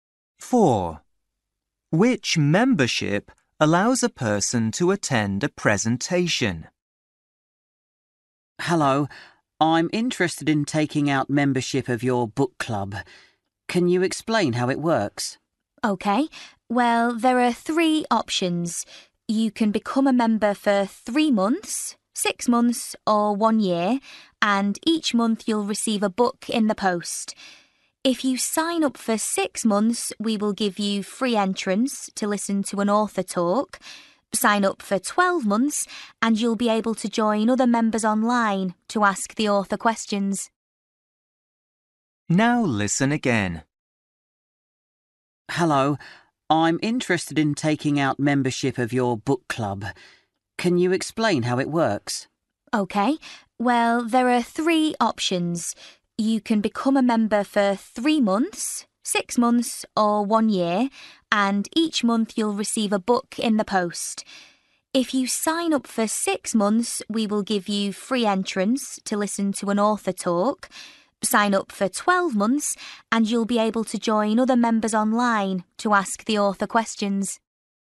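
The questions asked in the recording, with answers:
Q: Which membership allows a person to attend a presentation?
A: 6 months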